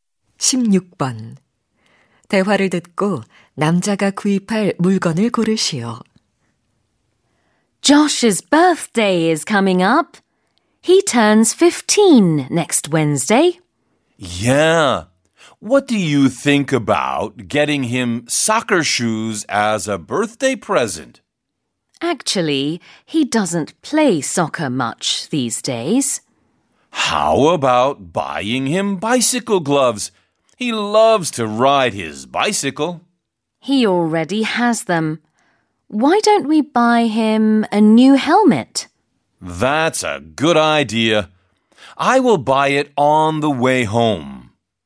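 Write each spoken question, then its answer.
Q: 대화를 듣고 남자가 구입할 물건을 고르시오.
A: 헬멧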